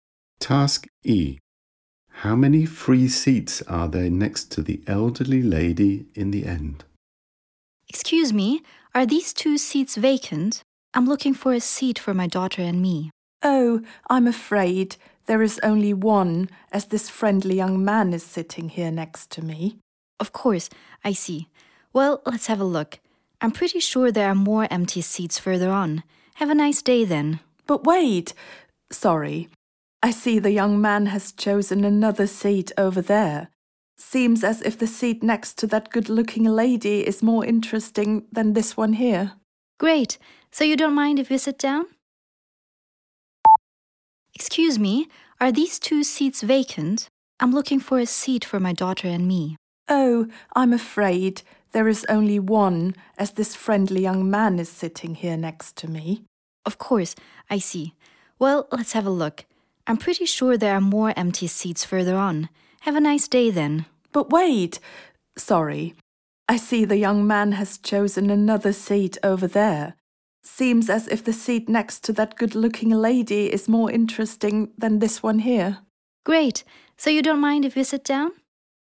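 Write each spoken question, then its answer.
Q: How many free seats are there next to the elderly lady in the end?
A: Two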